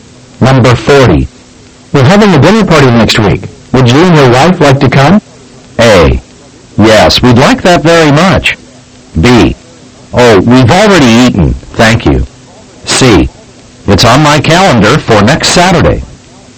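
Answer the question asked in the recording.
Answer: A: Yes, we'd like that very much.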